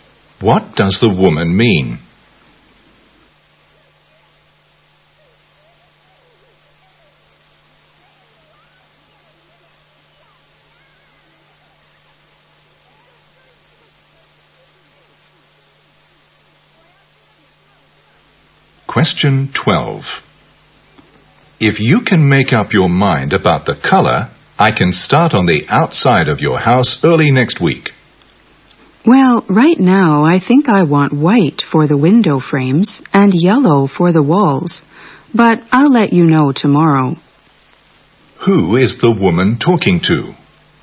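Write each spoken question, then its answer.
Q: Who is the woman talking to?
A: A house painter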